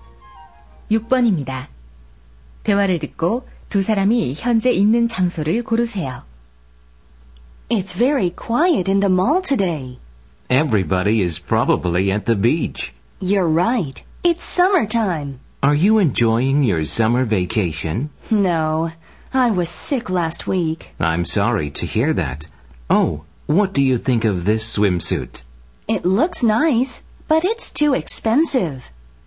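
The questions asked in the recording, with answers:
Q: 대화를 듣고 두 사람이 현재 있는 장소를 고르세요.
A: 쇼핑몰 (수영복 가게)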